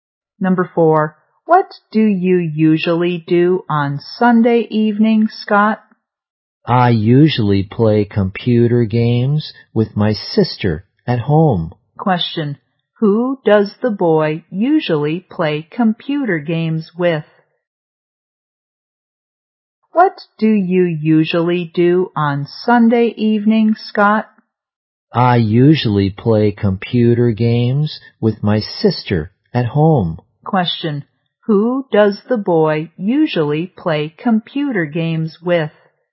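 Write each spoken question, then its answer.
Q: who does the boy usually play computer games with?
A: His sister.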